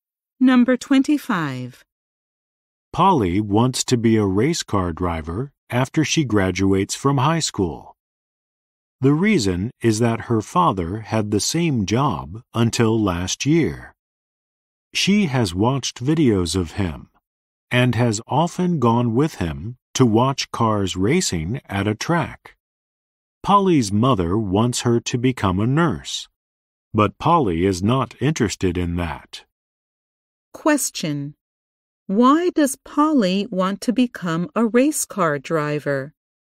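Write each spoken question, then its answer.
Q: Why does Polly want to become a race car driver?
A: Her father had the same job.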